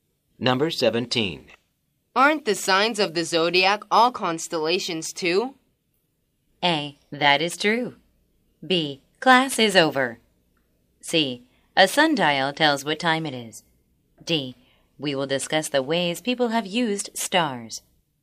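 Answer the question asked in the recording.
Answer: A: That is true.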